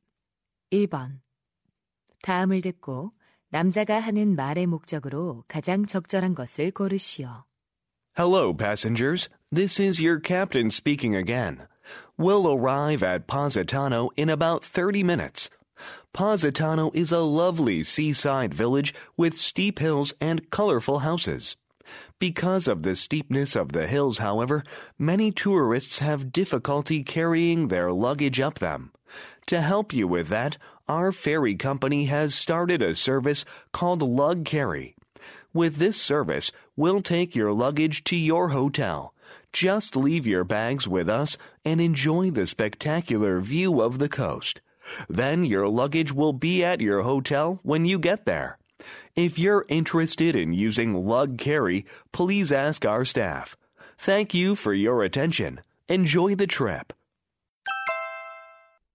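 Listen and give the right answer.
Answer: 수하물 운반 서비스(Lug Carry)를 안내하려고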